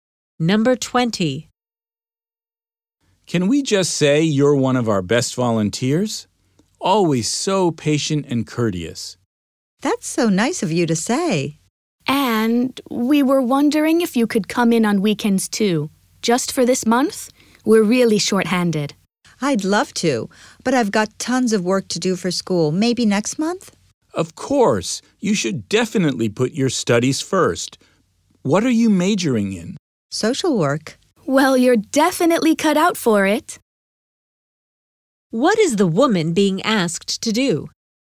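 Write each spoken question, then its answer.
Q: What is the woman being asked to do?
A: Volunteer on weekends this month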